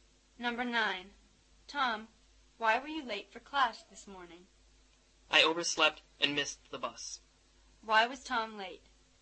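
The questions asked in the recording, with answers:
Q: Why was Tom late?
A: He overslept and missed the bus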